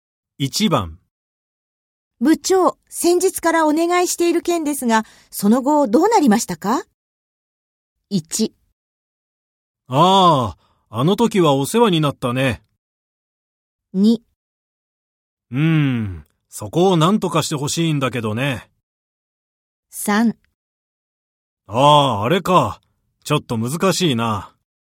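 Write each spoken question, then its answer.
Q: 部長、先日からお願いしている件ですが、その後どうなりましたか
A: 3: ああ、あれか。ちょっと難しいな。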